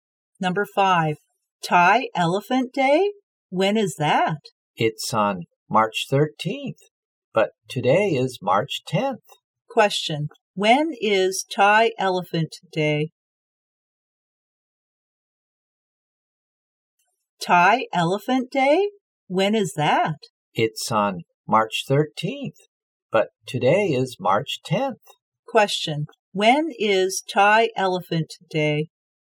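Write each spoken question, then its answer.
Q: when is Thai Elephant Day?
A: March 13th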